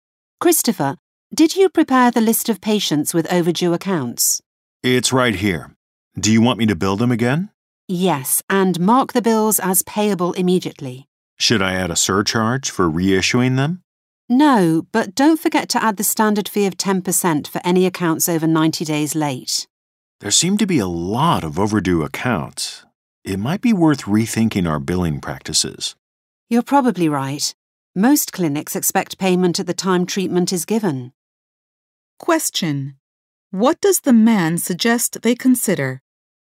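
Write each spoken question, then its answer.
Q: What does the man suggest they consider?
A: Rethinking their billing practices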